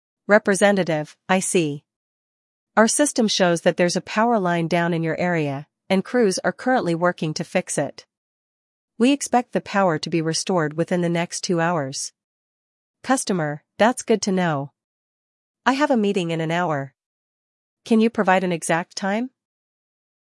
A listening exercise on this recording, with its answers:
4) What caused the power outage in the customer's area?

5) How long will it take to restore the power?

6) Why does the customer want an exact restoration time?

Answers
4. Power line down
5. Two hours
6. Customer has a meeting

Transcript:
Representative: I see. Our system shows that there's a power line down in your area, and crews are currently working to fix it. We expect the power to be restored within the next two hours.
Customer: That's good to know. I have a meeting in an hour. Can you provide an exact time?